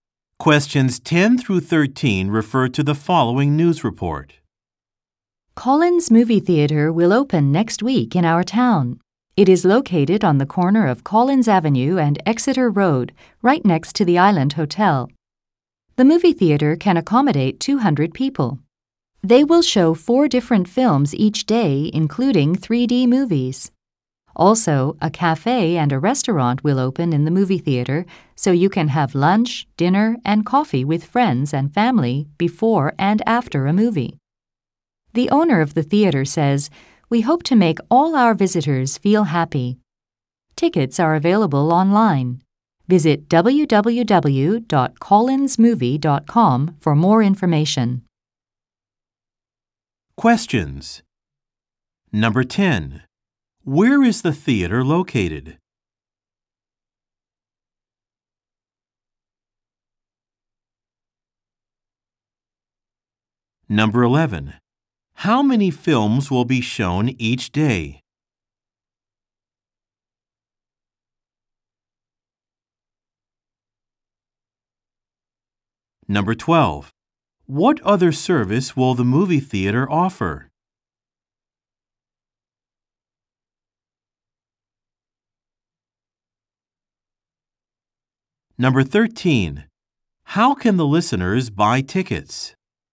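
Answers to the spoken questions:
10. On the corner of Collins Avenue and Exeter Road, next to the Island Hotel
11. 4 different films
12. A cafe and a restaurant
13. Online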